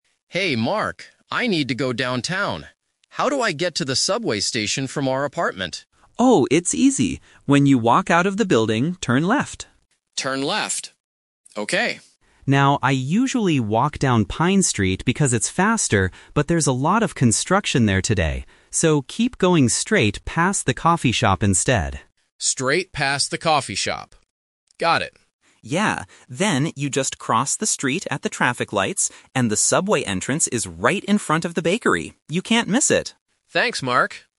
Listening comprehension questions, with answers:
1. What is the first thing Leo should do when he leaves the building?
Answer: Turn left.

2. Why shouldn't Leo walk down Pine Street today?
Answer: Because there is construction.

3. Where is the subway entrance?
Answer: In front of the bakery.

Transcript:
I need to go downtown. How do I get to the subway station from our apartment?
Mark: Oh, it's easy. When you walk out of the building, turn left.
Leo: Turn left. Okay.
Mark: Now, I usually walk down Pine Street because it's faster, but there's a lot of construction there today. So, keep going straight past the coffee shop instead.
Leo: Straight past the coffee shop. Got it.
Mark: Yeah. Then, you just cross the street at the traffic lights, and the subway entrance is right in front of the bakery. You can't miss it!